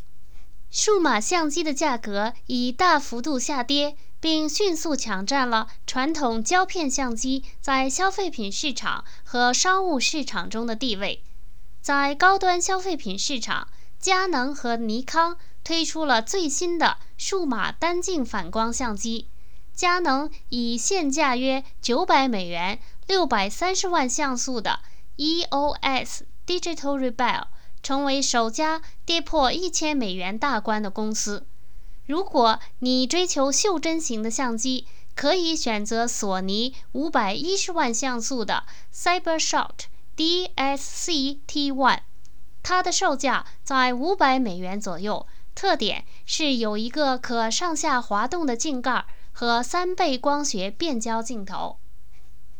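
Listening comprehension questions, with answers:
Please answer the following questions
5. 数码相机的价格有什么变化?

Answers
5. 价格已大幅度下跌,佳能EOS Digital Rebel现价约900美元,首家跌破1000美元大关。

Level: 3rd Year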